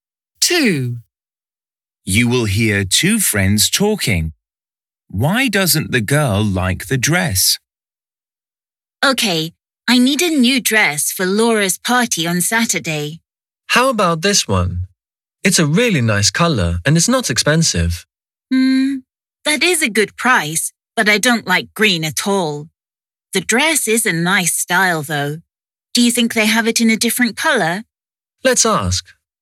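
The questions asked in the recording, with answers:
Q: Why doesn't the girl like the dress?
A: She doesn't like the colour green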